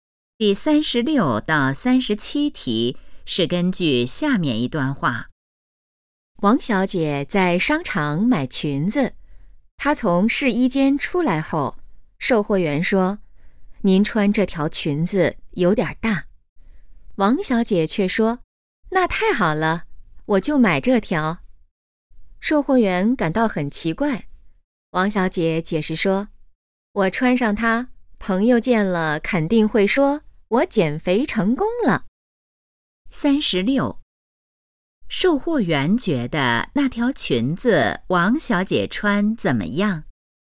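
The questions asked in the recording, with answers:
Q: 售货员觉得那条裙子王小姐穿怎么样?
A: 有点大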